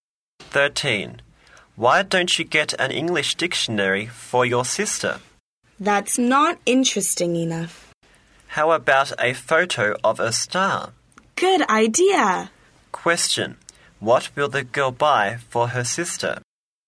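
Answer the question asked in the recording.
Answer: A photo of a star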